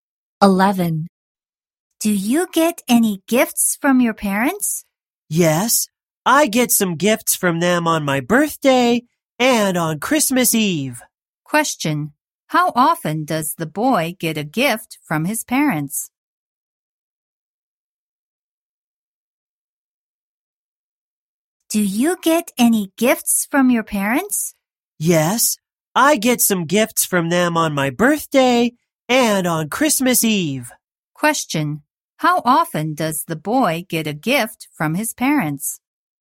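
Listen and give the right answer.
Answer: Twice a year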